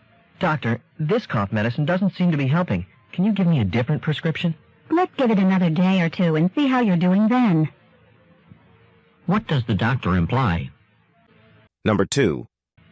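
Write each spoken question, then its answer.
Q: What does the doctor imply?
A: The man should keep taking the current medicine for another day or two before changing it.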